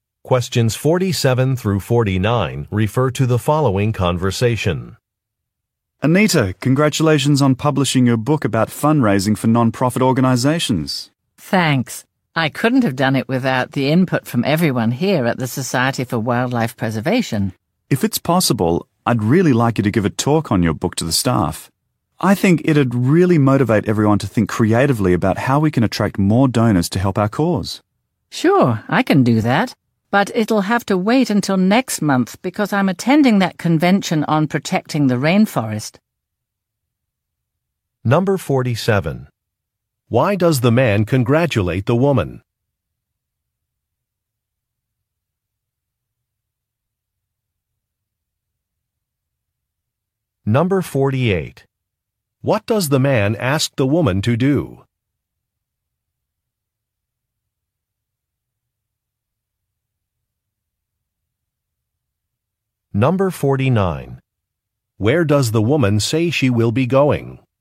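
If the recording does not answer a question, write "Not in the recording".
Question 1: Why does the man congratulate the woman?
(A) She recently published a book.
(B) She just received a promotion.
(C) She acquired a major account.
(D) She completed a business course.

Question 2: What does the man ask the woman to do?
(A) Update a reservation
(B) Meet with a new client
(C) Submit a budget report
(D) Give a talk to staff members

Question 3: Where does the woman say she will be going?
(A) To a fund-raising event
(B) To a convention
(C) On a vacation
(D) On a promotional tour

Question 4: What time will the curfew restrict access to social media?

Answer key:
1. She recently published a book.
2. Give a talk to staff members
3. To a convention
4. Not in the recording

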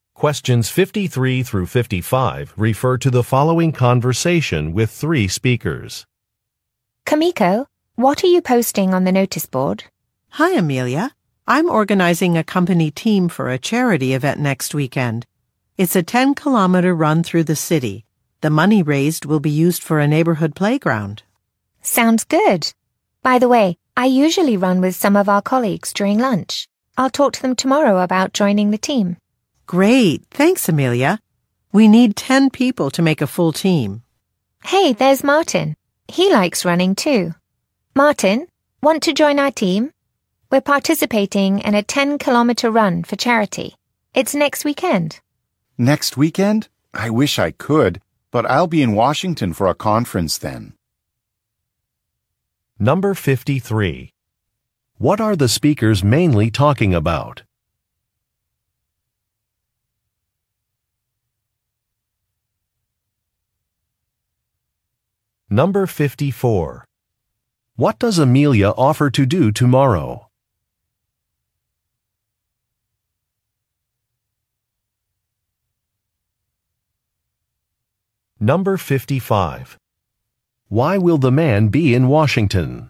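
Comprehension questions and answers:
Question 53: What are the speakers mainly talking about?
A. A holiday parade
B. A charity event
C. A health seminar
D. A company picnic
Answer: A charity event

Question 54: What does Amelia offer to do tomorrow?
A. Speak with some colleagues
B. Pick up some supplies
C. Finalize a travel itinerary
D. Contact a news reporter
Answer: Speak with some colleagues

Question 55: Why will the man be in Washington?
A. To inspect a building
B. To accept an award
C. To attend a conference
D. To interview for a job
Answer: To attend a conference

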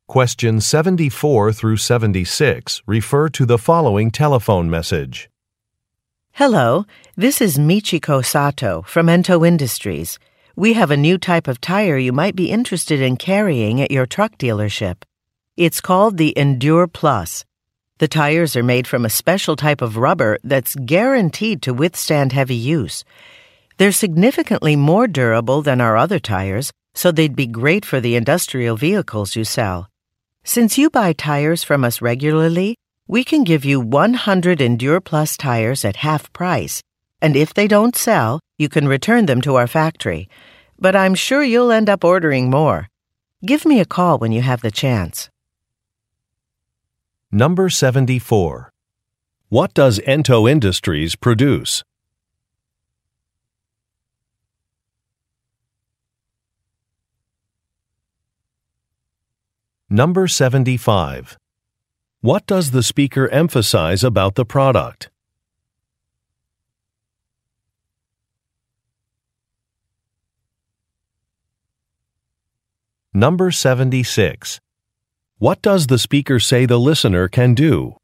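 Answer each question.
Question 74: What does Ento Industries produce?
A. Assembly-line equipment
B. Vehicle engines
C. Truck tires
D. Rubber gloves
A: Truck tires

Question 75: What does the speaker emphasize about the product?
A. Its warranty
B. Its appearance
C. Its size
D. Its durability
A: Its durability

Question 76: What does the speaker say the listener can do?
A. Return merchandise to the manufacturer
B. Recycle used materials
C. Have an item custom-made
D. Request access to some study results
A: Return merchandise to the manufacturer

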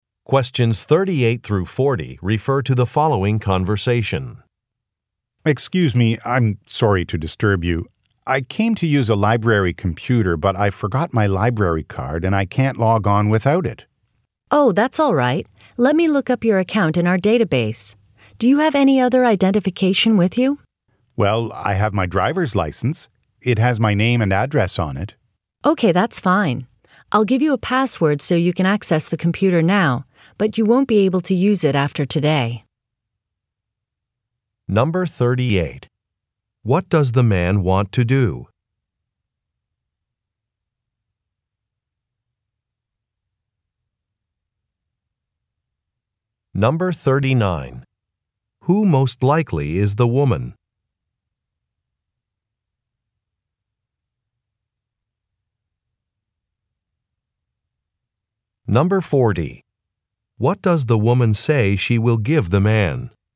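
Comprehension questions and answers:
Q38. What does the man want to do?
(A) Sign up for membership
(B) Use a computer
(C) Make a telephone call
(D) Borrow some materials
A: Use a computer

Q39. Who most likely is the woman?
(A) A librarian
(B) A security guard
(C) A software developer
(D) A salesperson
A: A librarian

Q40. What does the woman say she will give the man?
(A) An application form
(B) An Internet address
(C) A business card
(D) A temporary password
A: A temporary password

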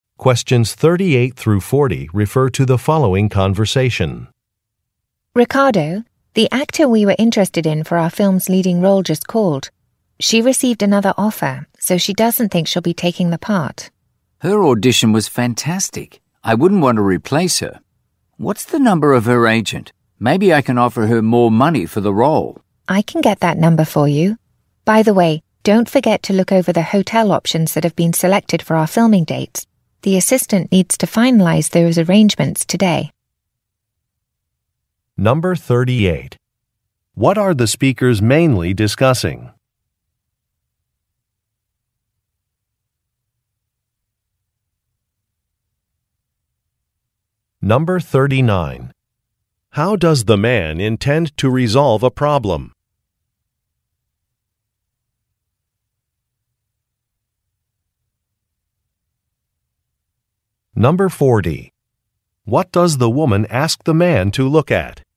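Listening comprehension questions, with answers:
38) What are the speakers mainly discussing?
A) Hiring an actor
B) Recreating a scene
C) Replacing some cameras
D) Purchasing some costumes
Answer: Hiring an actor

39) How does the man intend to resolve a problem?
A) By changing a start date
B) By doing some research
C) By revising a film script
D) By negotiating a salary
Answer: By negotiating a salary

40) What does the woman ask the man to look at?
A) A catering contract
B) Some flight arrangements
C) An employment law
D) Some lodging possibilities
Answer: Some lodging possibilities

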